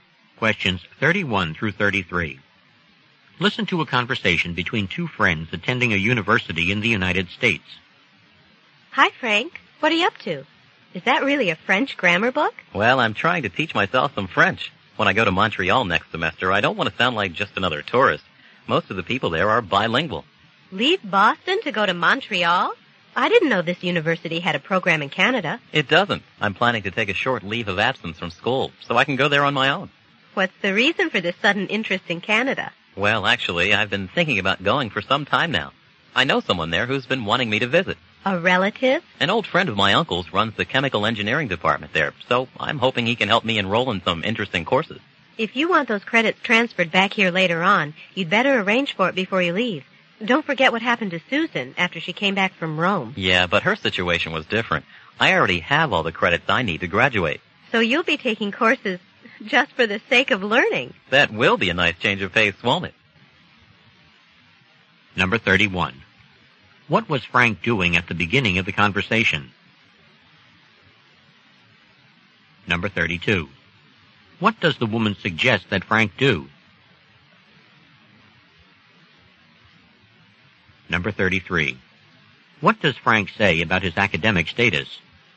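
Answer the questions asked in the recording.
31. Studying a French grammar book
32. Arrange the credit transfer before he leaves
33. He already has all the credits he needs to graduate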